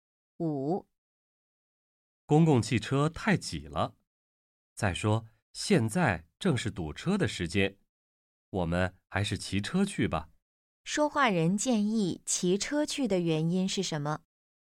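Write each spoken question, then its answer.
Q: 说话人建议骑车去的原因是什么?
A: 公共汽车太挤,而且现在正是堵车的时间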